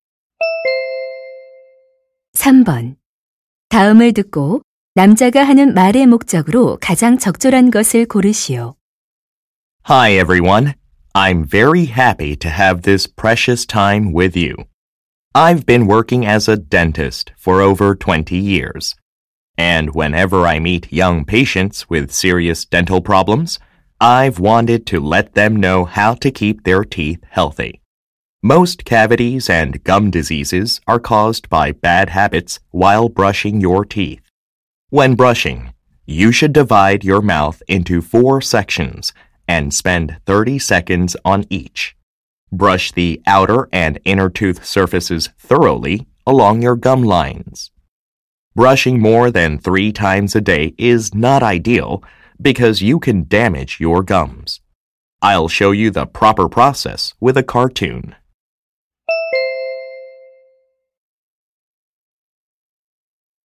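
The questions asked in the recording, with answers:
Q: 다음을 듣고 남자가 하는 말의 목적으로 가장 적절한 것을 고르시오.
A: 올바른 양치질 방법을 알려 주려고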